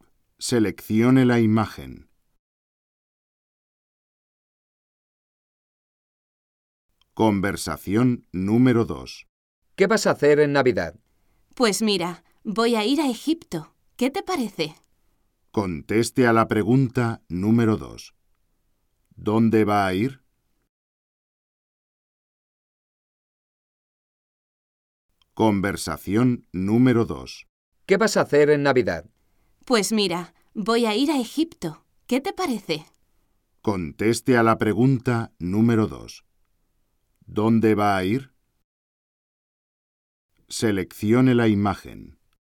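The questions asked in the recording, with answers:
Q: ¿Dónde va a ir?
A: A Egipto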